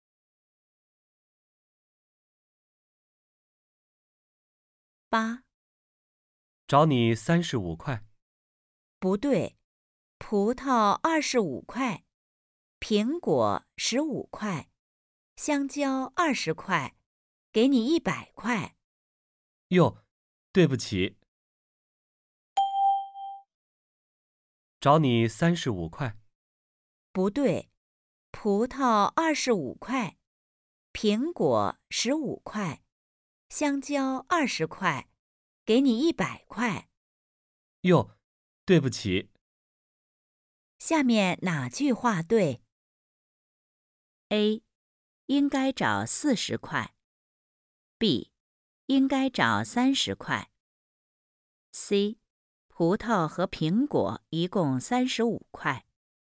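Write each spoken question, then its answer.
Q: 下面哪句话对?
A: A: 应该找四十块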